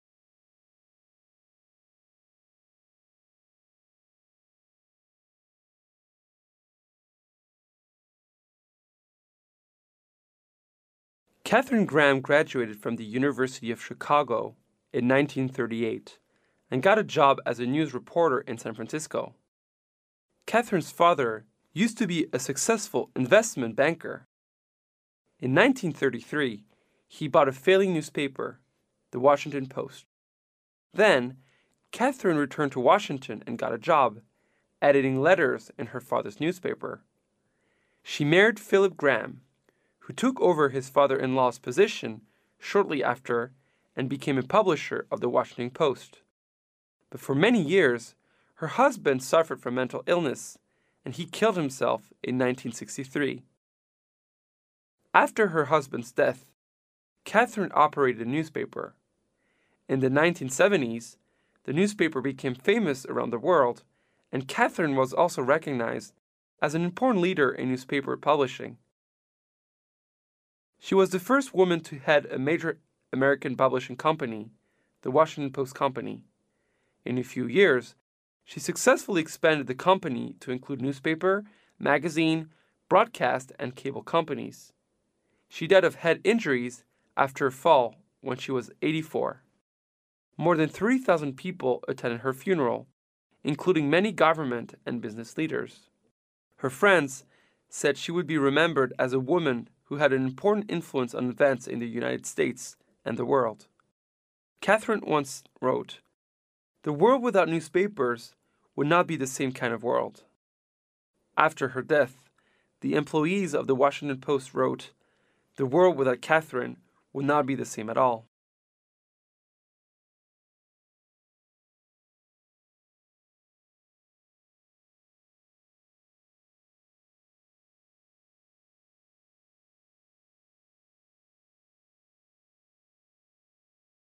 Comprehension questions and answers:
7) What do we learn from the passage about Catherine's father?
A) He is a successful investment banker.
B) He sold his falling bank.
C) He worked in the falling bank.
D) He is good at editing.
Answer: A) He is a successful investment banker.

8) What does the speaker tell us about Catherine Gram?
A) She leaded the company after her father retired.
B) She is not so successful.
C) Her husband died of cancer.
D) She worked in her father's newspaper.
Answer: D) She worked in her father's newspaper.

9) What does the comment by employees of The Washington Post suggest?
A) She didn't do much contribution to the world.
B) Her life is worthy.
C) If there is not Catherine, the world will appear differently.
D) If there is not Catherine, the world will be the same.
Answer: C) If there is not Catherine, the world will appear differently.

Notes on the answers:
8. 细节题。根据"...in his father's newspaper"可知正确答案为D。
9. 推断题。从文章最后一句话与C意思一致可推断出正确答案为C。

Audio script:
A
[听力原文] 14-16 Catherine Gram graduated from the University of Chicago in 1938 and got a job as a news reporter in San Francisco. Catherine's father used to be a successful investment banker. In 1933, he bought a failing newspaper, The Washington Post. Then Catherine returned to Washington and got a job, editing letters in her father's newspaper. She married Philip Gram, who took over his father-in-law's position shortly after and became a publisher of The Washington Post. But for many years, her husband suffered from mental illness and he killed himself in 1963. After her husband's death, Catherine operated the newspaper. In the 1970s, the newspaper became famous around the world and Catherine was also recognized as an important leader in newspaper publishing. She was the first woman to head a major American publishing company, the Washington Post company. In a few years, she successfully expanded the company to include newspaper, magazine, broadcast and cable companies. She died of head injuries after a fall when she was 84. More than 3 thousand people attended her funeral, including many government and business leaders. Her friends said she would be remembered as a woman who had an important influence on events in the United States and the world. Catherine once wrote, "The world without newspapers would not be the same kind of world." After her death, the employees of The Washington Post wrote, "The world without Catherine would not be the same at all." [解析] 细节题。

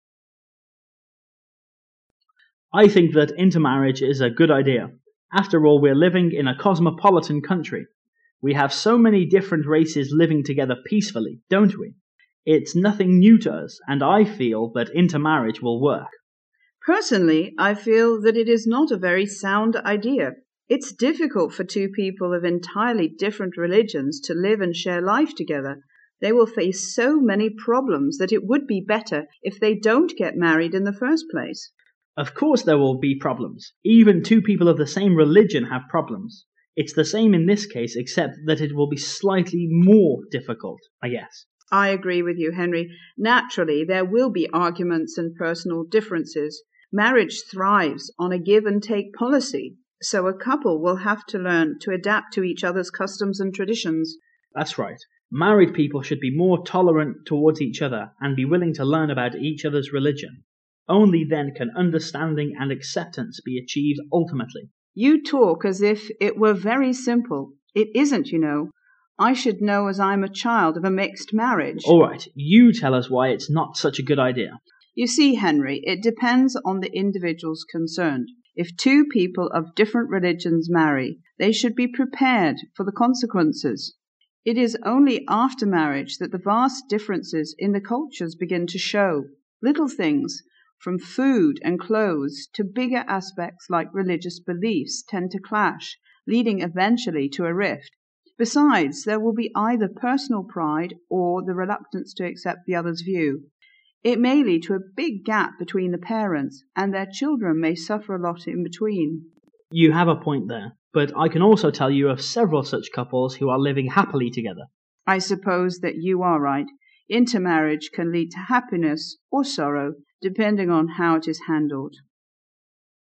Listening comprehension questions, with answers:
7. Which word may best describe the two speakers' positions on intermarriage?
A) Comparison.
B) Contrast.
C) Casuality.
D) Bias.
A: B) Contrast.

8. How does marriage usually thrive concerning customs and traditions according to the woman?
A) On a give-and-take policy.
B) Beyond a give-and-take policy.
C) In the manner of each other's adaptation.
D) Due to religious beliefs.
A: A) On a give-and-take policy.

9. The cultural differences arise __ according to the woman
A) at the wedding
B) before intermarriage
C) after people get married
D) until recently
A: C) after people get married

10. What negative effects may the intermarriage most probably cause?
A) A divorce.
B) Much suffering in children's minds.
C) A big gap between the parents.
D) All of the above.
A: D) All of the above.

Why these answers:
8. 答案对应于第二个话轮中女士的第三句话:Marriage thrives on a give-and-take policy...。
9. 本题答案信息对应于第四个话轮中女士的第三句话:It is only after marriage that...begin to show,用强调句表明婚后才会出现文化差异,[C]只是表达不同。
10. 在第四个话轮中,女士分析了通婚带来的不利影响。其最后三句中提到了leading eventually to a rift(最终导致分手)、lead to a big gap between the parents(导致父母间出现分歧)、their children may suffer a lot(孩子们受很多的苦),分别与前三个选项对应,故选[D]。

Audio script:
[听力原文] 14-17 M: I think that intermarriage is a good idea. After all, we are living in a cosmopolitan country. We have so many different races living together peacefully, don't we? It is nothing new to us, and I feel that intermarriage will work out. W: Personally, I feel that it is not a very sound idea. It is difficult for two people of entirely different religions to live and share life together. They will face so many problems that it would be better if they don't get married in the first place. M: Of course there will be problems. Even two people of the same religion have problems. It is the same in this case, except that it will be slightly more difficult, I guess. W: I agree with you, Henry. Naturally, there will be arguments and personal differences. Marriage thrives on a give-and-take policy, so a couple will have to learn to adapt to each other's customs and traditions. M: That's right. Married people should be more tolerant towards each other and be willing to learn about each other's religion. Only then can understanding and acceptance be achieved ultimately. W: You talk as if it were very simple. It isn't, you know. I should know, as I am a child of a mixed marriage. M: All right, you tell us why is is not such a good idea. W: You see, Henry, it depends on the individuals concerned. If two people of different religions marry, they should be prepared for the consequences. It is only after marriage that the vast differences in the cultures begin to show. Little things, from food and clothes to bigger aspects like religious beliefs, tend to clash, leading eventually to a rift. Besides, there will be either personal pride or the reluctance to accept the other's views. It may lead to a big gap between the parents, and their children may suffer a lot in between. M: You have a point there, but I can also tell you of several such couples who are living happily together. W: I suppose that you are right. Intermarriage can lead go happiness or sorrow, depending on how it is handled.

